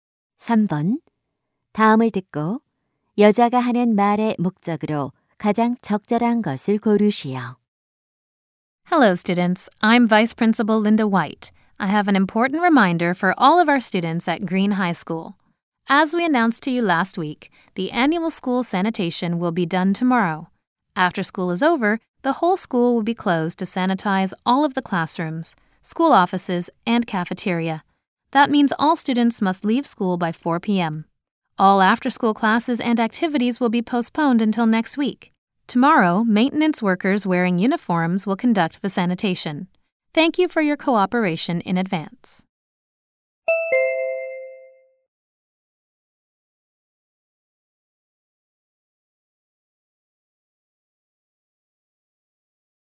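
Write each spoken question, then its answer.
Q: 다음을 듣고 여자가 하는 말의 목적으로 가장 적절한 것을 고르시오.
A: 내일 학교 소독 실시로 오후 4시까지 하교해야 함을 알리려고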